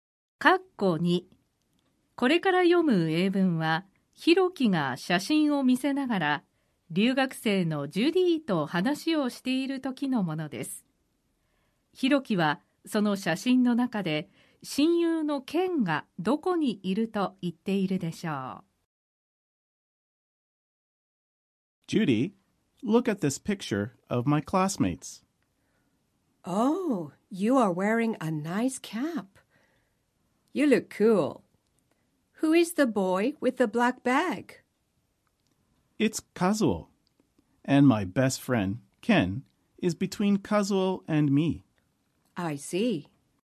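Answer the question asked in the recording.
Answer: カズオとヒロキの間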